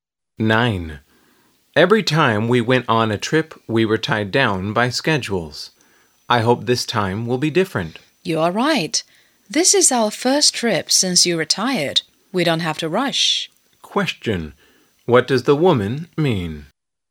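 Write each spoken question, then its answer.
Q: What does the woman mean?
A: They can take their time on this trip without schedules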